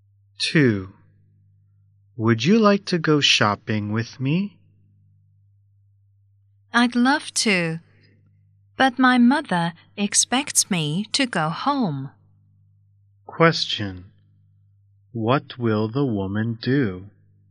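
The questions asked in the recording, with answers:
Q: What will the woman do?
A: Go home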